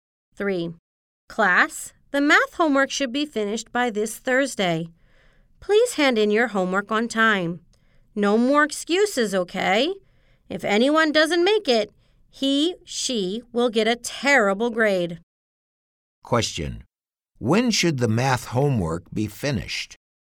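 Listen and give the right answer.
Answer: By this Thursday.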